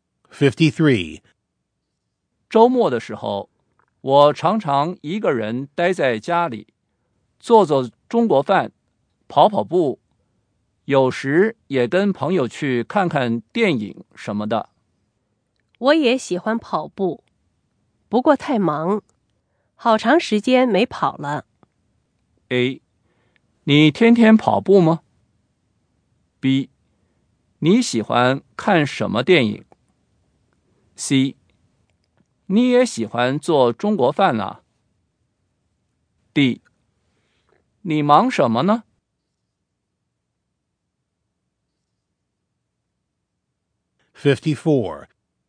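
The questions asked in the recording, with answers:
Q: 周末的时候,我常常一个人待在家里,做做中国饭,跑跑步,有时也跟朋友去看看电影什么的。我也喜欢跑步,不过太忙,好长时间没跑了。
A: D: 你忙什么呢?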